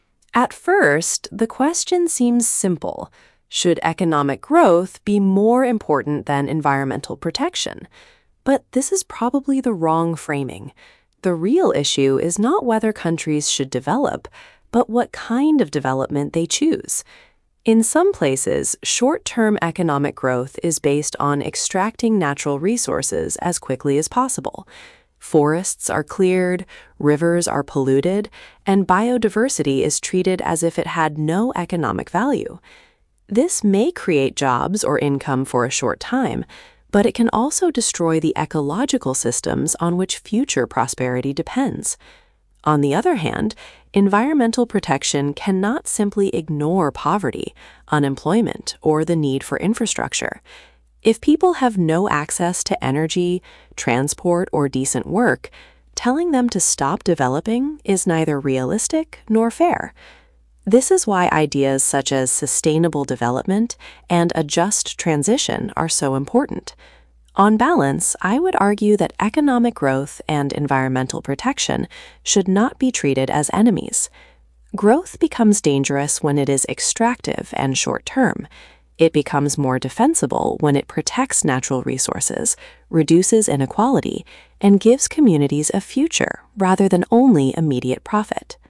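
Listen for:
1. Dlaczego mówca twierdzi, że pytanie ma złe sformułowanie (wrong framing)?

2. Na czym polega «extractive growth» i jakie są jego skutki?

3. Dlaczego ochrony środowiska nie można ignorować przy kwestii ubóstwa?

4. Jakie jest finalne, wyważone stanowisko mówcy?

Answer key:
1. Bo prawdziwy problem to nie to, czy kraje mają się rozwijać, ale jaki rodzaj rozwoju wybierają.
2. Na jak najszybszym wydobywaniu zasobów naturalnych; lasy są wycinane, rzeki zanieczyszczane, niszczona jest bioróżnorodność – daje krótkotrwałe miejsca pracy, ale niszczy ekosystemy, od których zależy przyszły dobrobyt.
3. Bo ludziom bez dostępu do energii, transportu i godnej pracy nie można realistycznie ani sprawiedliwie kazać przestać się rozwijać.
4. Wzrost gospodarczy i ochrona środowiska nie powinny być traktowane jak wrogowie; wzrost jest niebezpieczny, gdy jest rabunkowy i krótkoterminowy, a łatwiej go obronić, gdy chroni zasoby, zmniejsza nierówności i daje społecznościom przyszłość.

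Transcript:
In some places, short-term economic growth is based on extracting natural resources as quickly as possible. Forests are cleared, rivers are polluted and biodiversity is treated as if it had no economic value. This may create jobs or income for a short time, but it can also destroy the ecological systems on which future prosperity depends.
On the other hand, environmental protection cannot simply ignore poverty, unemployment or the need for infrastructure. If people have no access to energy, transport or decent work, telling them to stop developing is neither realistic nor fair. This is why ideas such as sustainable development and a just transition are so important.
On balance, I would argue that economic growth and environmental protection should not be treated as enemies. Growth becomes dangerous when it is extractive and short-term. It becomes more defensible when it protects natural resources, reduces inequality and gives communities a future rather than only immediate profit.

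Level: B2+/C1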